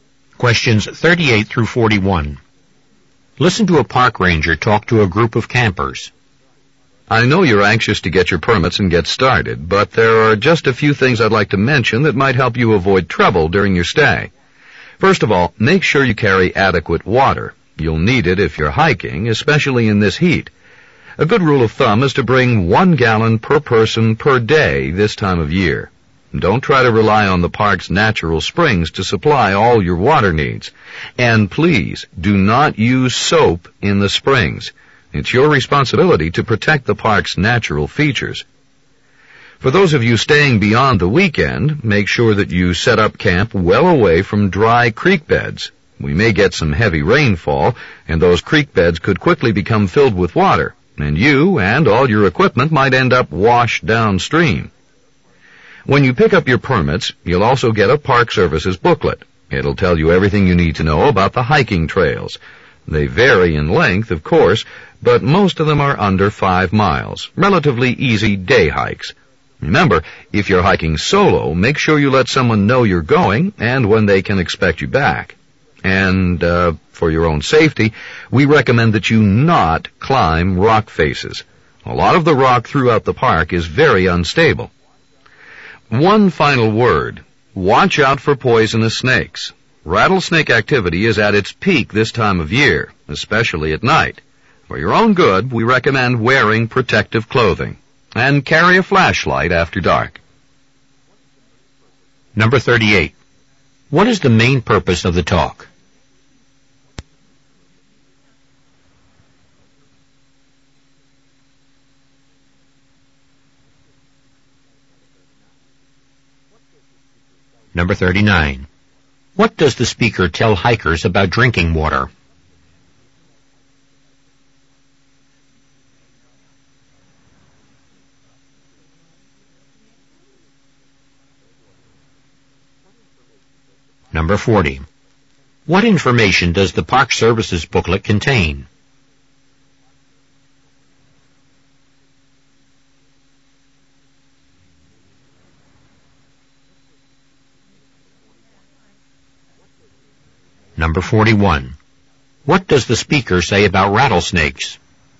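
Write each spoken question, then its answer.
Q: What is the main purpose of the talk?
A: To give campers safety advice for their stay in the park

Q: What does the speaker tell hikers about drinking water?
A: Bring 1 gallon per person per day; don't rely on the park's springs

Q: What information does the Park Service's booklet contain?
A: Information about the hiking trails

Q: What does the speaker say about rattlesnakes?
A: They are most active at this time of year, especially at night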